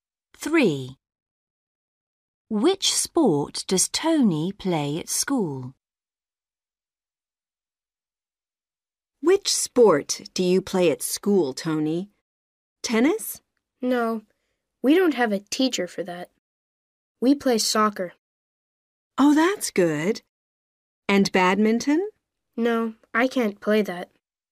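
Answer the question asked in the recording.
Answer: soccer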